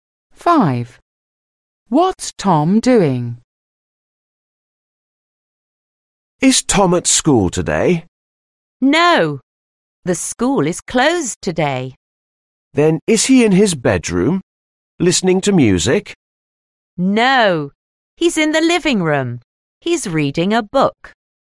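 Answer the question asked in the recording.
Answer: Reading a book in the living room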